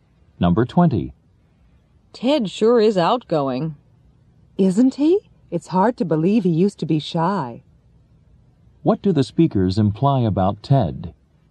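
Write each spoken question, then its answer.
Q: What do the speakers imply about Ted?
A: Ted used to be shy but now he is outgoing.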